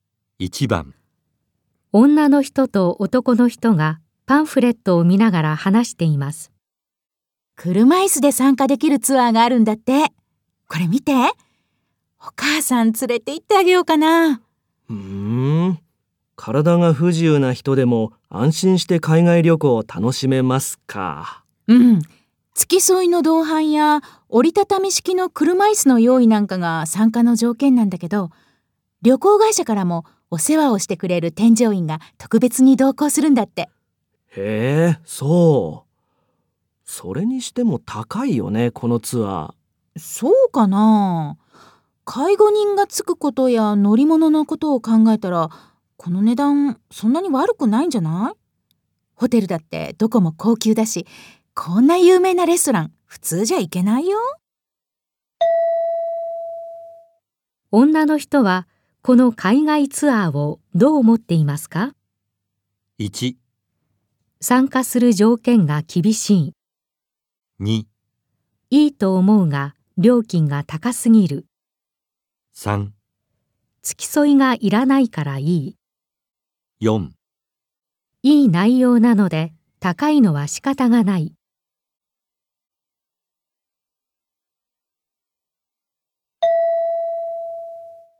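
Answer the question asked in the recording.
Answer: 4: いい内容なので高いのは仕方がない。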